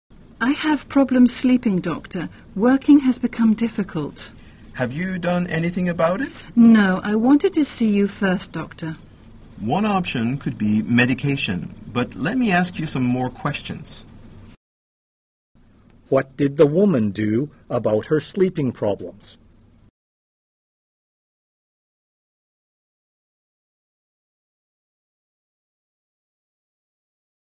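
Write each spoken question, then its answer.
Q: What did the woman do about her sleeping problems?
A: Nothing; she came to see the doctor first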